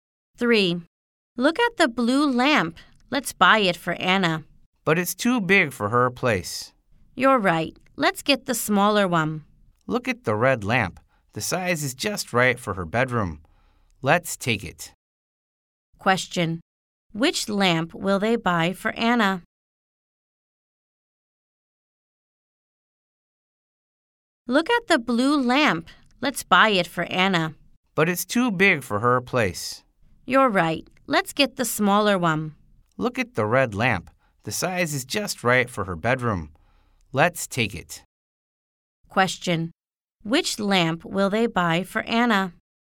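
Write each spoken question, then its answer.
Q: Which lamp will they buy for Anna?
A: The red lamp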